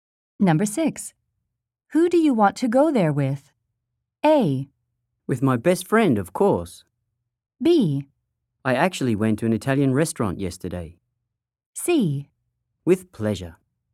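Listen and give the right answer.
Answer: A: With my best friend, of course.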